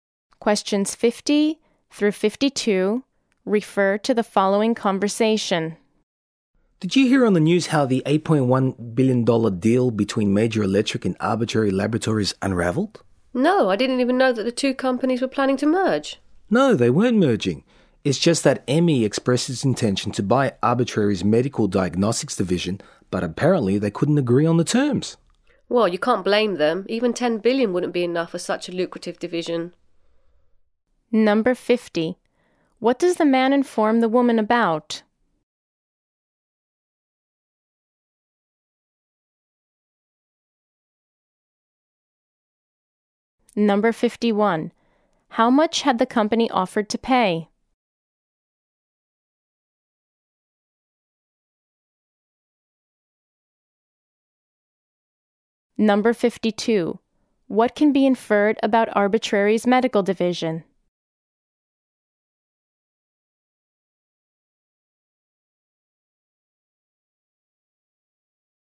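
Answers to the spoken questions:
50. The $8.1 billion deal between Major Electric and Arbitrary Laboratories fell apart
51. $8.1 billion
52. It is very profitable (worth more than $10 billion)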